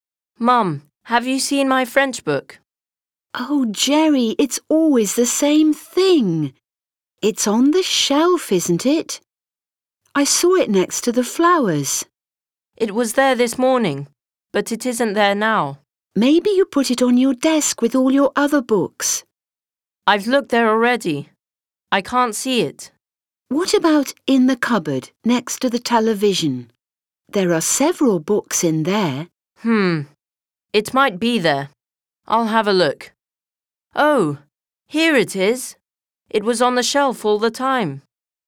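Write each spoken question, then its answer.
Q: Where is Jerry's book?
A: On the shelf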